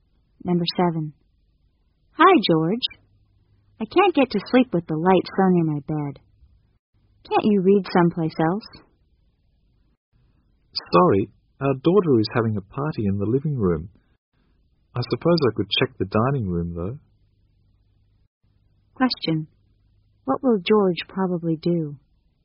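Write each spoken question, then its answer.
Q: What will George probably do?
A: Go and read in the dining room.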